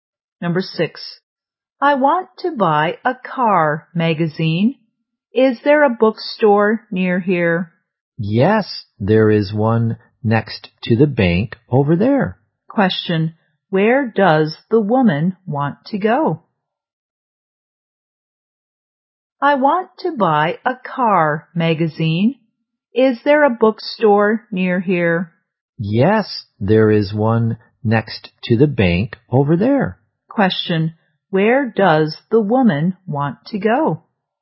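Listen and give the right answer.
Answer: To a bookstore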